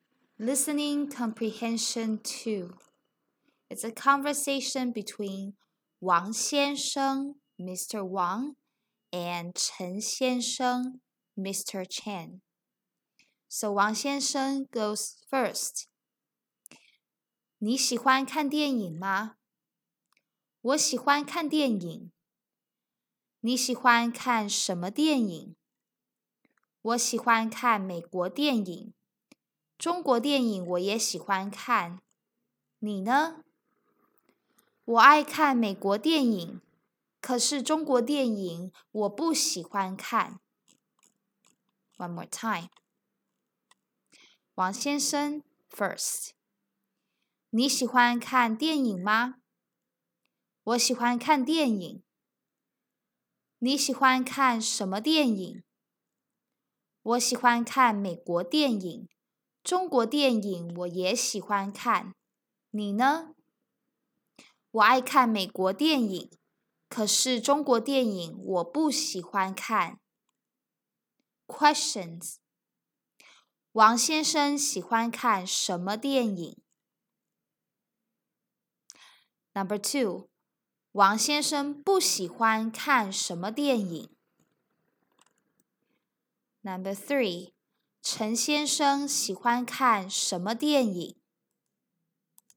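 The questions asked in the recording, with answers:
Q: 王先生喜欢看什么电影?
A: 美国电影

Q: 王先生不喜欢看什么电影?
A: 中国电影

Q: 陈先生喜欢看什么电影?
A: 美国电影和中国电影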